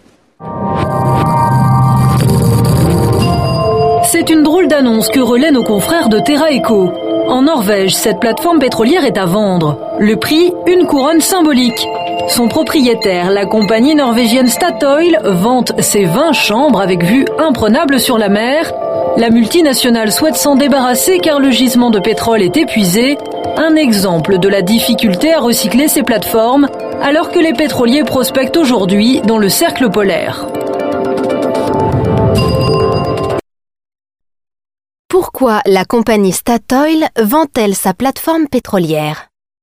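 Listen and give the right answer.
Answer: Parce que le gisement de pétrole est épuisé.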